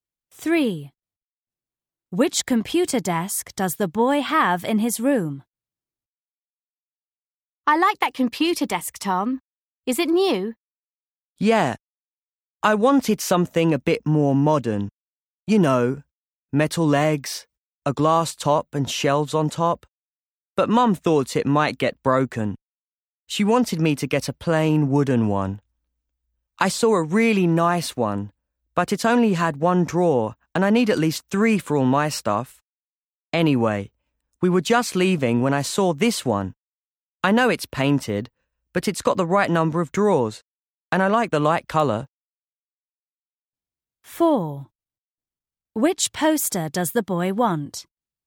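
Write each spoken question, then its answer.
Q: Which computer desk does the boy have in his room?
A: A light-coloured painted desk with three drawers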